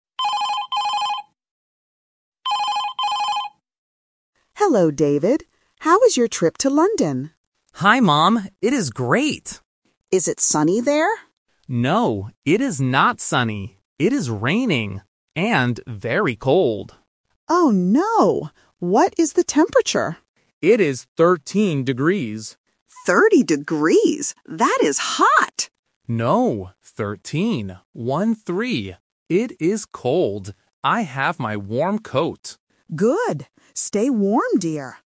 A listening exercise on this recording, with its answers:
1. What is the weather like in London?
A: Raining

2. What is the temperature?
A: 13 degrees

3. What does David have with him?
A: A warm coat

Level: A1